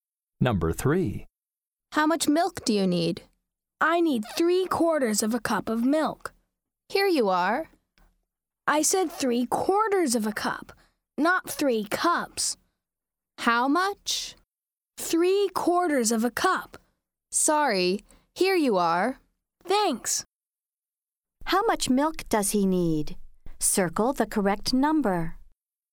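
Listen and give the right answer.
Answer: 3/4 of a cup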